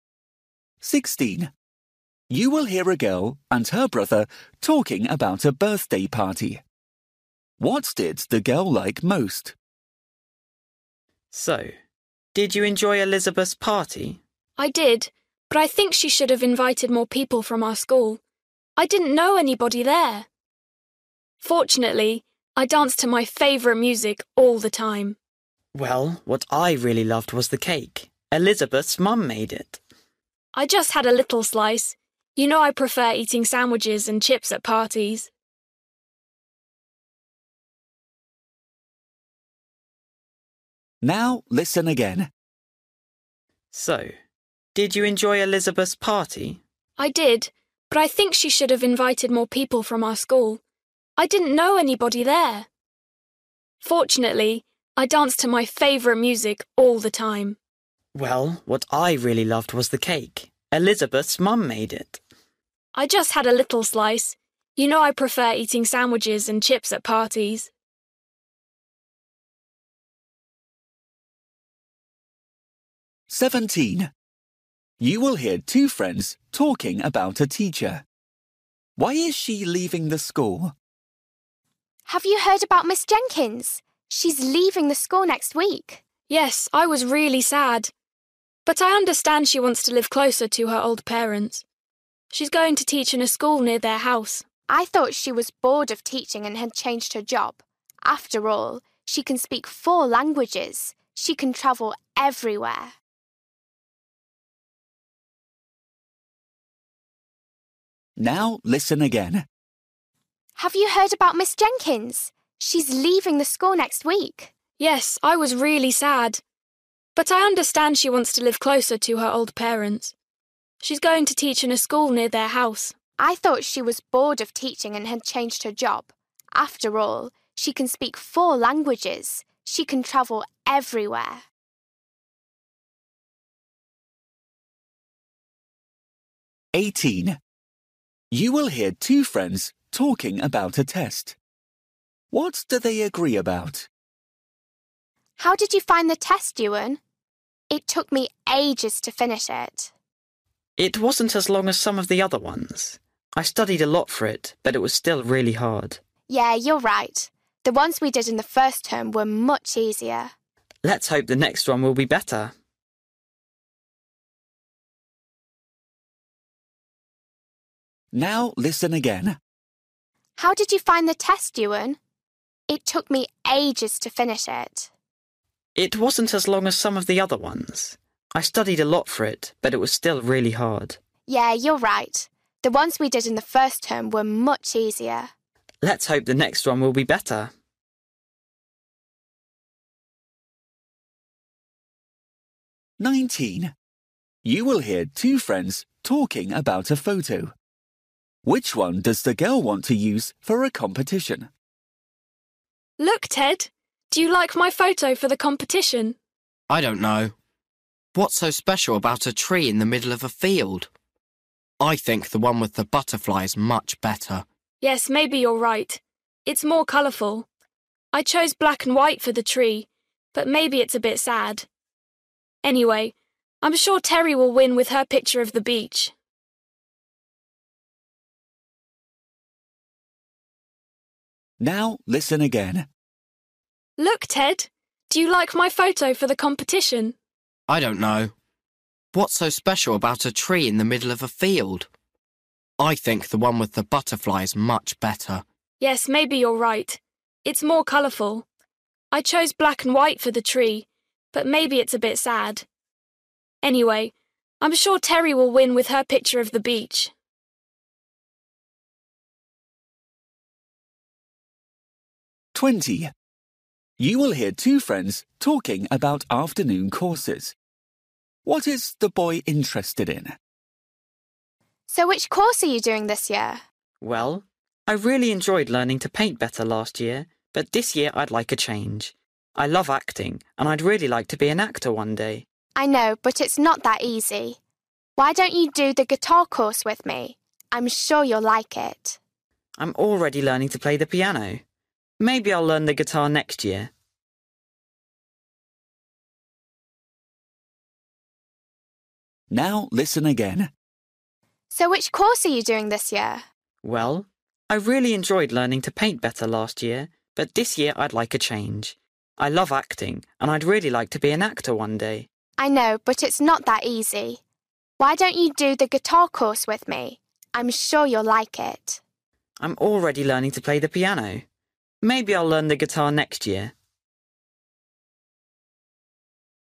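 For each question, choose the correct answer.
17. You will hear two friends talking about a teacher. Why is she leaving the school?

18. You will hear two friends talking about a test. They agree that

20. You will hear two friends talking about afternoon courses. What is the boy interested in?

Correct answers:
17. She wants to live closer to her old parents.
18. the test was really hard
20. acting

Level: Luyện nghe trình độ A2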